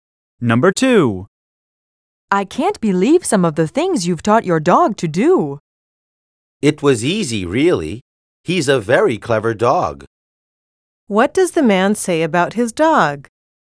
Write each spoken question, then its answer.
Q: What does the man say about his dog?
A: Letter K is correct.